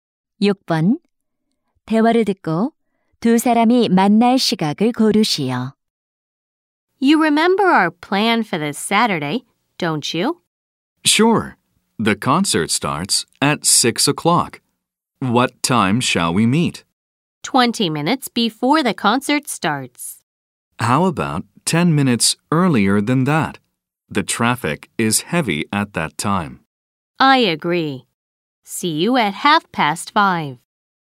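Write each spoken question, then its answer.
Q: 대화를 듣고 두 사람이 만날 시각을 고르시오.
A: 5시 30분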